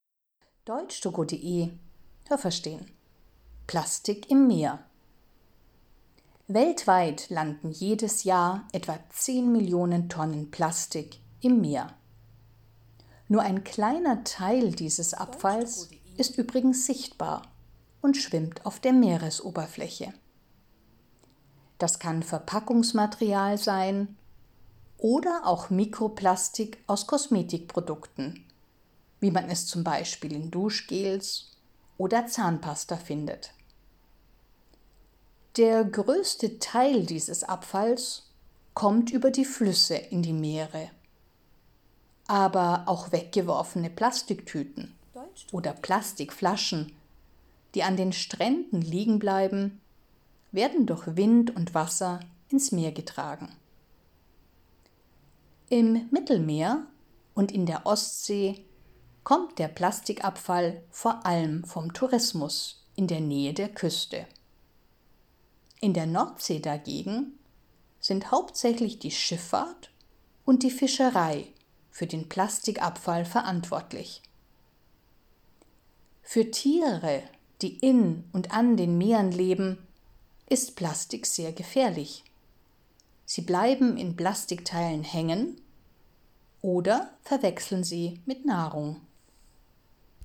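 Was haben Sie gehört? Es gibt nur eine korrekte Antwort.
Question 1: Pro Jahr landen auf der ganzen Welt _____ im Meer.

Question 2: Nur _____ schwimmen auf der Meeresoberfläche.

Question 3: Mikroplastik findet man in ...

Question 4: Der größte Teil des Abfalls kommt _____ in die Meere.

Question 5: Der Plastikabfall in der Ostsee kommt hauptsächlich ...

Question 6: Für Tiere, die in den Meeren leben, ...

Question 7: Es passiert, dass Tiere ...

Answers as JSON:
{"1": "etwa 10 Millionen Tonnen Plastik", "2": "ein kleiner Teil des Abfalls", "3": "Kosmetikprodukten wie Duschgels oder Zahnpasta", "4": "über die Flüsse", "5": "vom Tourismus in der Nähe der Küste", "6": "ist Plastik sehr gefährlich", "7": "in Plastikteilen hängen bleiben oder sie mit Nahrung verwechseln"}

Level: A (einfach)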